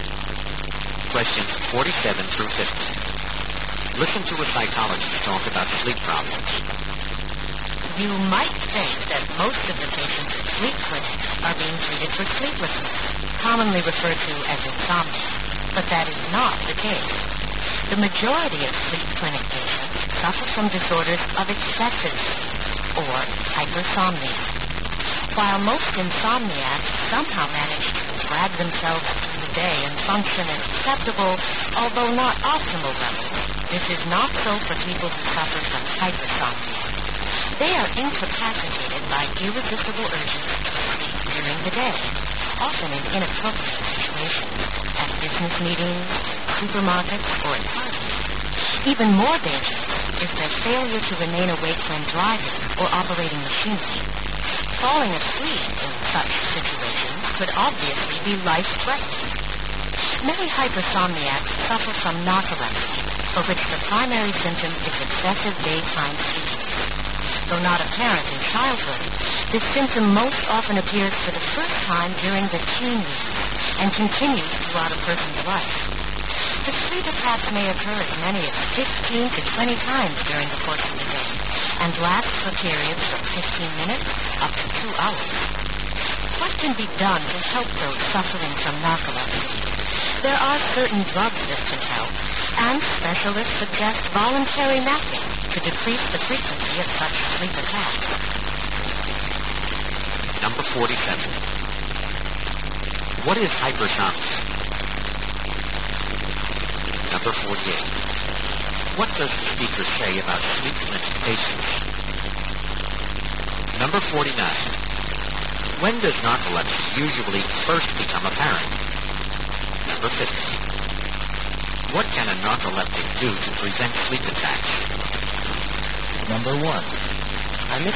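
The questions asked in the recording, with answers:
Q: What is hypersomnia?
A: Excessive sleep

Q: What does the speaker say about sleep clinic patients?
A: Most suffer from excessive sleep, not insomnia

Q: When does narcolepsy usually first become apparent?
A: During the teen years

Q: What can a narcoleptic do to prevent sleep attacks?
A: Take voluntary naps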